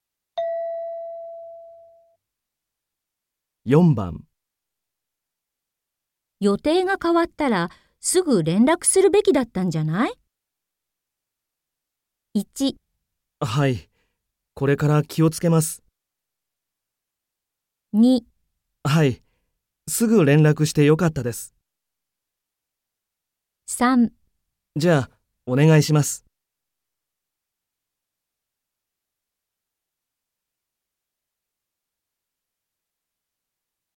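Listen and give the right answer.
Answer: はい、これから気をつけます。

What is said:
F:予定が変わったらすぐ連絡するべきだったんじゃない?
M:1 はい、これから気をつけます。
2 はい、すぐ連絡してよかったです。
3 じゃあ、お願いします。

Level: N3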